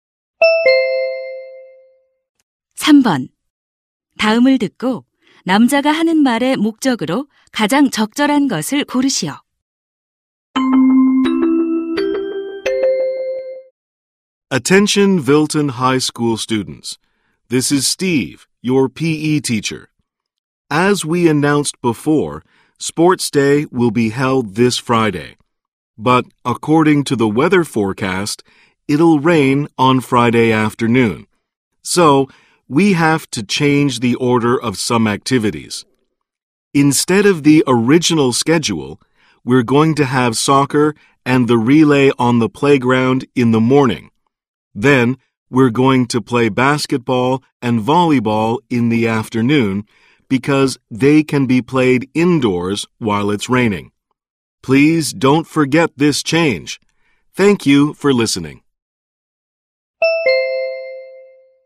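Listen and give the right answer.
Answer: 비 예보 때문에 체육대회 일정 변경을 알리려고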